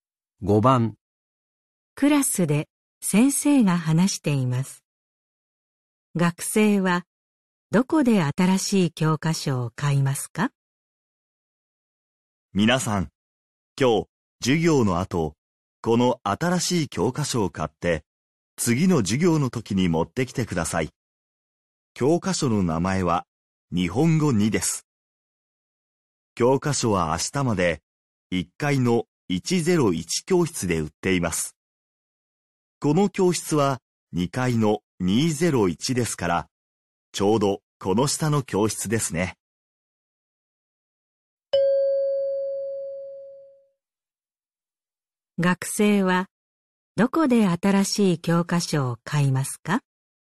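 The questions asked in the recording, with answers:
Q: 学生はどこで新しい教科書を買いますか?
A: 1階の101教室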